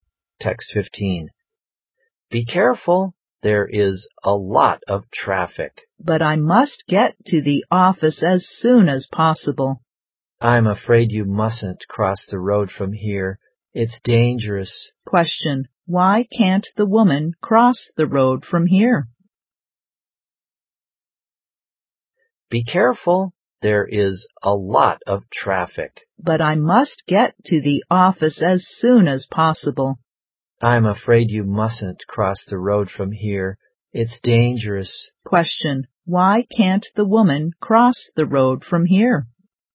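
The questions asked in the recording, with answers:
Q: Why can't the woman cross the road from here?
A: Because it's dangerous; there is a lot of traffic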